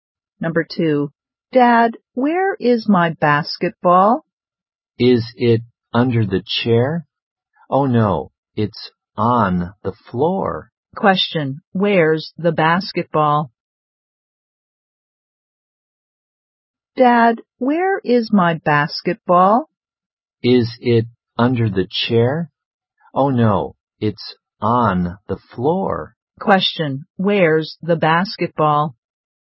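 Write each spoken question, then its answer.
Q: where's the basketball?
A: On the floor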